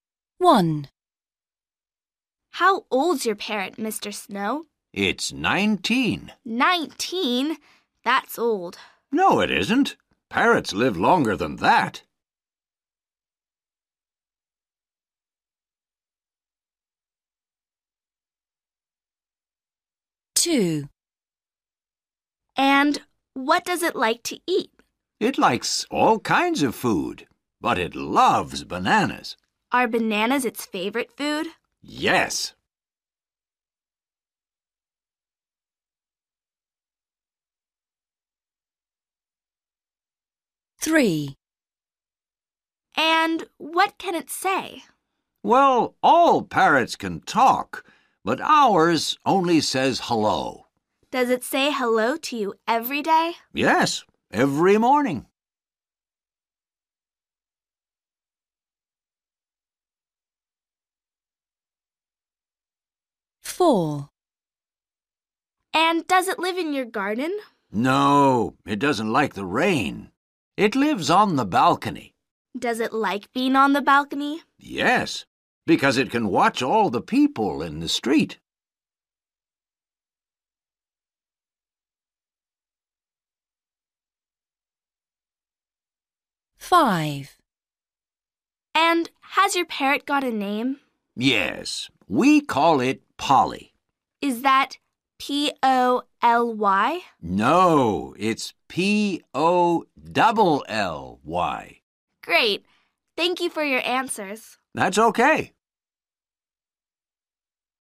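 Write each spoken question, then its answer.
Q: How old's your parrot, Mr.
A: 19

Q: And what does it like to eat?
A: bananas

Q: And what can it say?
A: hello

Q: And does it live in your garden?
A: No, on the balcony

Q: And has your parrot got a name?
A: Polly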